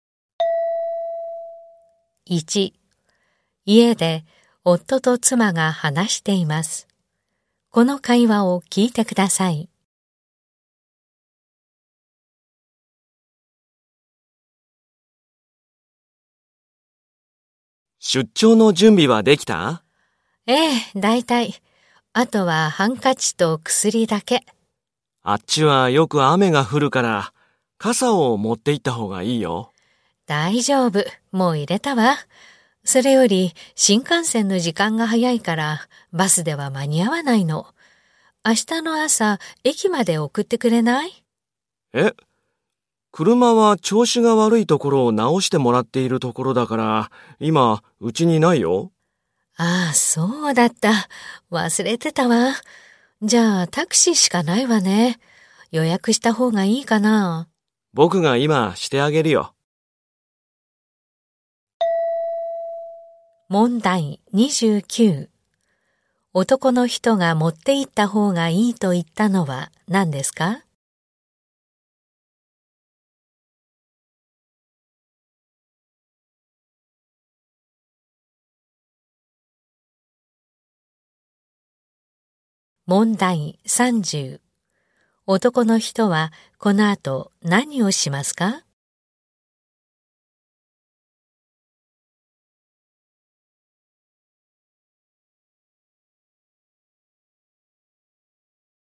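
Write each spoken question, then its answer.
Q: 男の人はこの後何をしますか?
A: タクシーを予約する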